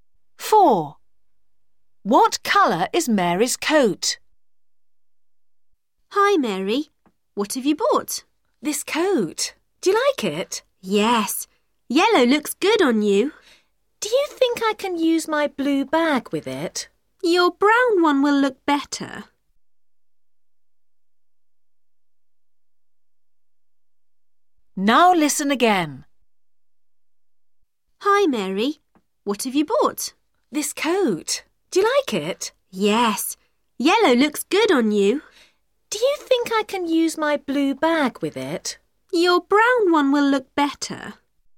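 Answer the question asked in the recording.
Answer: yellow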